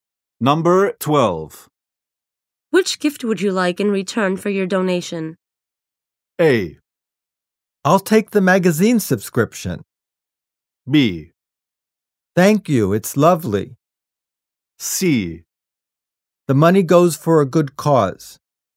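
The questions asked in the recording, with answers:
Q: Which gift would you like in return for your donation?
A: A: I'll take the magazine subscription.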